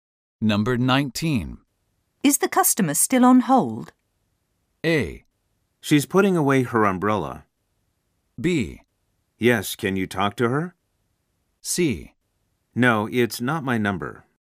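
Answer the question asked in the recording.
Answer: B: Yes, can you talk to her?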